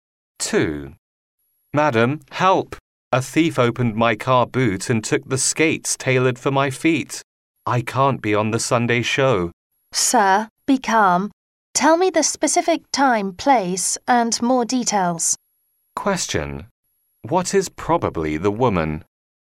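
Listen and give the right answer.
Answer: A police officer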